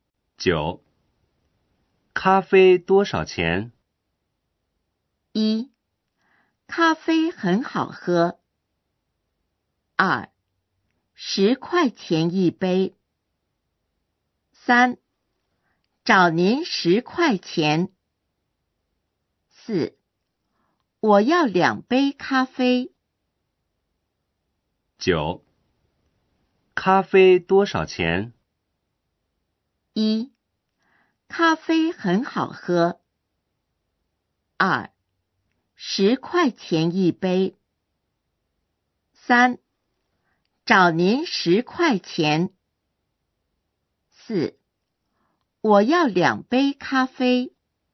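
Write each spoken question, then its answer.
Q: 咖啡多少钱?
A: 2: 10块钱一杯。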